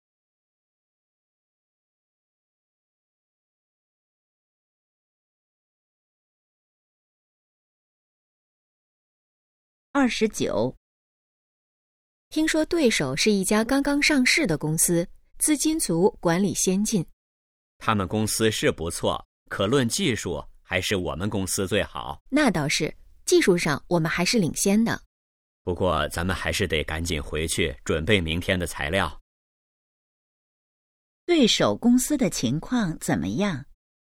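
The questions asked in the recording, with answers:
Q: 对手公司的情况怎么样?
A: 资金足,管理先进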